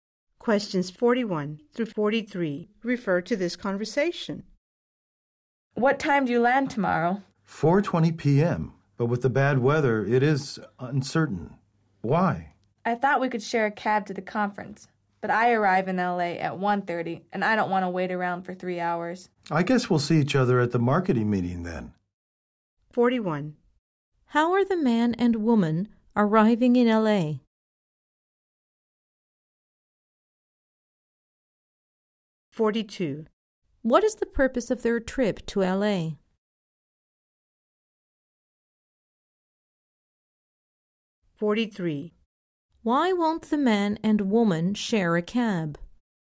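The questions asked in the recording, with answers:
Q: How are the man and woman arriving in L.A.?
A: By plane

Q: What is the purpose of their trip to L.A.?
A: A conference

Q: Why won't the man and woman share a cab?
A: They arrive about 3 hours apart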